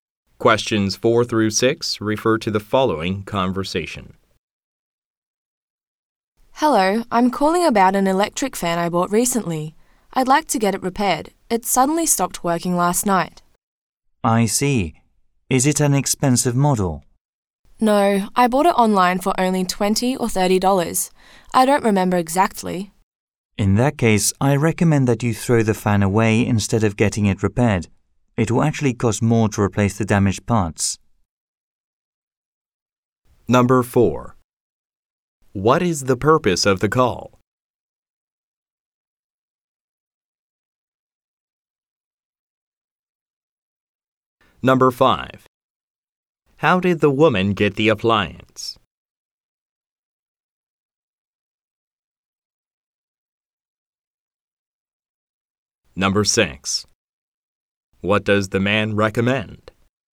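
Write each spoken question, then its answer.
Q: What is the purpose of the call?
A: To get an electric fan repaired.

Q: How did the woman get the appliance?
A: She bought it online.

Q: What does the man recommend?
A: Throwing the fan away instead of repairing it.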